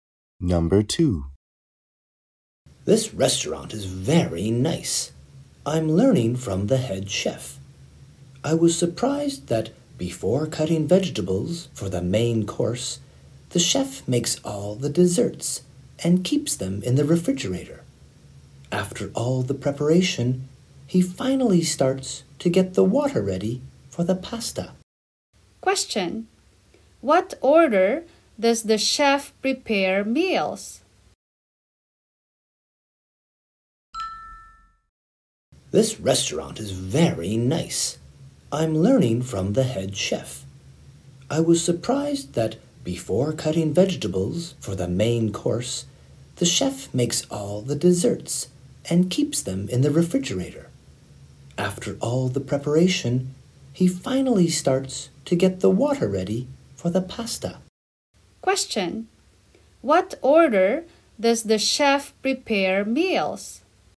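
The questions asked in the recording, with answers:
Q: Question: What order does the chef prepare meals?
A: Desserts, then vegetables, then pasta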